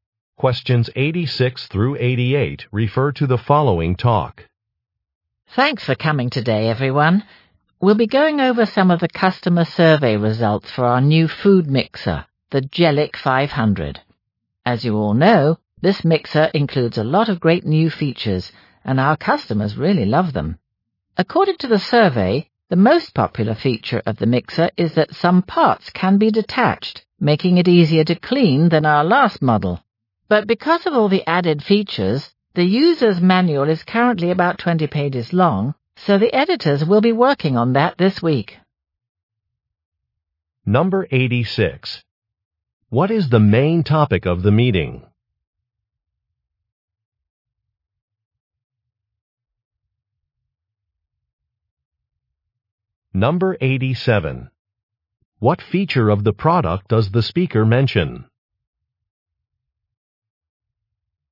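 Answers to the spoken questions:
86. Customer survey results for a new mixer
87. Parts that can be removed for easy cleaning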